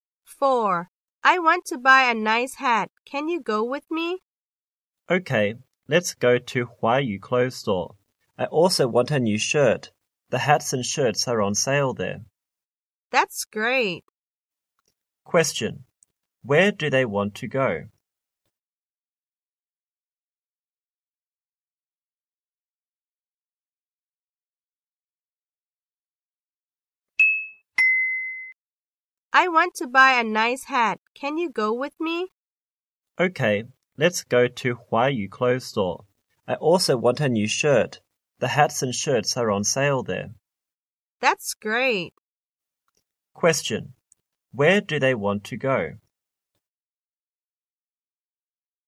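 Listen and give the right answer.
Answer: Huayu Clothes Store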